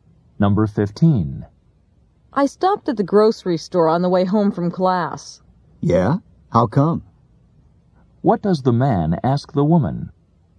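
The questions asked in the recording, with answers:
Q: What does the man ask the woman?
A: Why she stopped at the grocery store.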